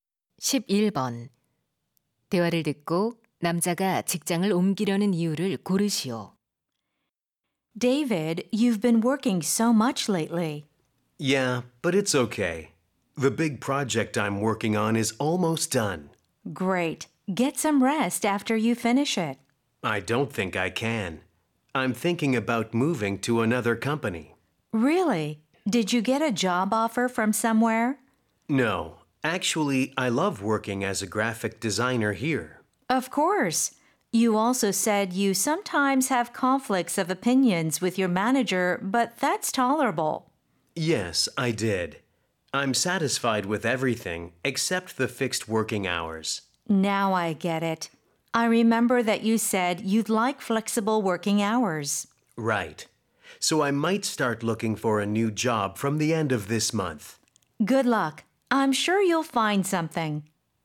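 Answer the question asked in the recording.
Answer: 유연 근무제를 원해서(고정된 근무 시간 때문에)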